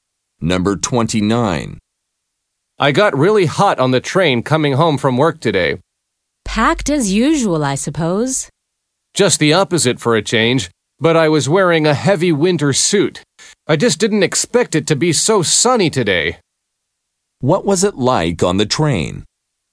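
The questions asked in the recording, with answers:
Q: What was it like on the train?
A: Not crowded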